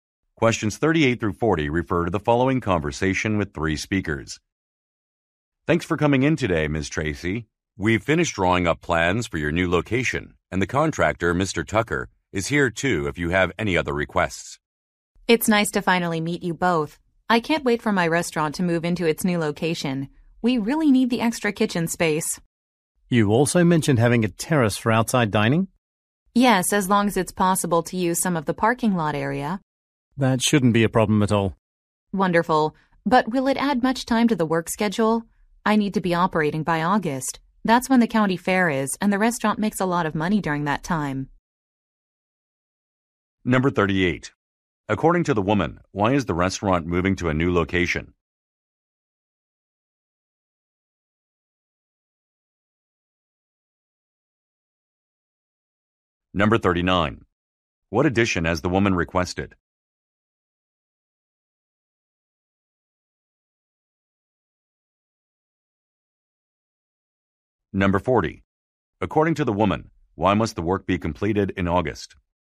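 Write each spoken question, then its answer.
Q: According to the woman, why is the restaurant moving to a new location?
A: It needs extra kitchen space

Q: What addition has the woman requested?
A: A terrace for outside dining

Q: According to the woman, why must the work be completed in August?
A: The county fair is then and the restaurant makes a lot of money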